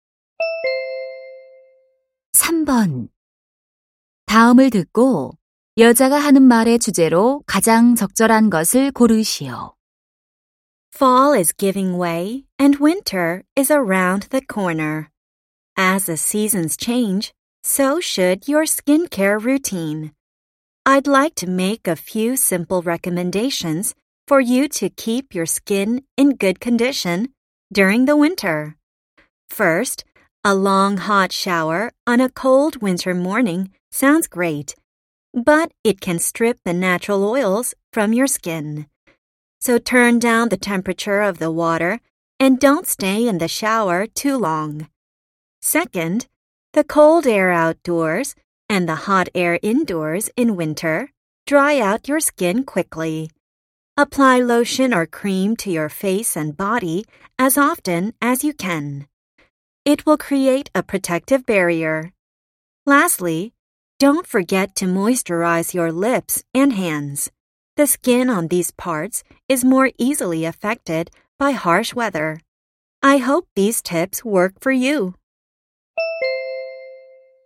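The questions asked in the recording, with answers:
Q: 다음을 듣고 여자가 하는 말의 주제로 가장 적절한 것을 고르시오.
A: 겨울철 피부 관리 방법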